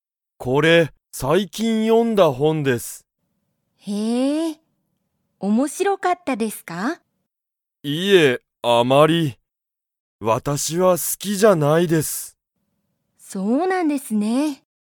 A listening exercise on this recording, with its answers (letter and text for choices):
斎藤さいとうさんは、その本ほんが好すきですか?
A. はい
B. いいえ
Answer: B. いいえ

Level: Level 1